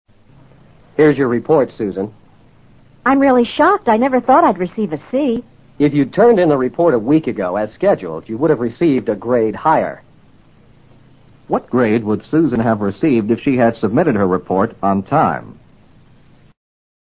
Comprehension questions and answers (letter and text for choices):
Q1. What grade would Susan have received if she had submitted her report on time?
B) She would've received a C.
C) She would've received a D.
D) She would've received a B.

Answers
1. D) She would've received a B.

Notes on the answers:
此题难在对问题的理解。问题是"如果她按时递交报告,她会得什么样的分数?"这是一句虚拟疑问句。submit her report on time与turn in the report as scheduled同义。男方说她要是按时递交了报告,她的得分会比现在高一级。而她现在的得分是'C',高一级自然是'B'。

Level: 世博高级听说